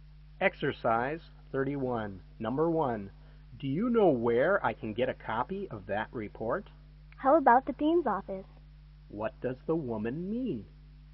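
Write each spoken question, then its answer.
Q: What does the woman mean?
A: The man might get a copy at the dean's office.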